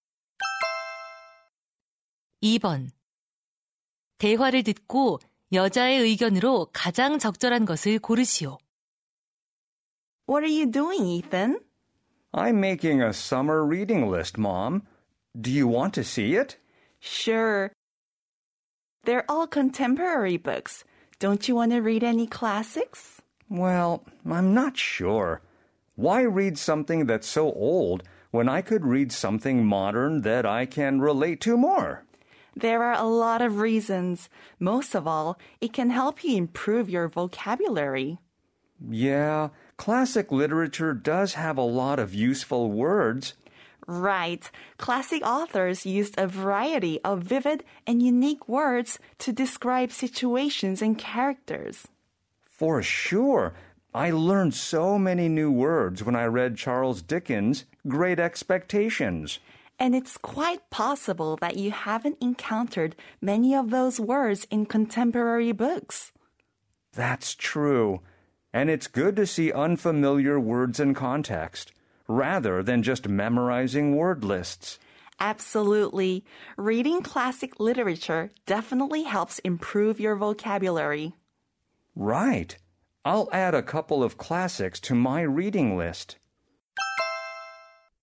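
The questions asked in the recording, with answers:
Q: 대화를 듣고 여자의 의견으로 가장 적절한 것을 고르시오.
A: 고전 문학 읽기는 어휘력 향상에 도움이 된다.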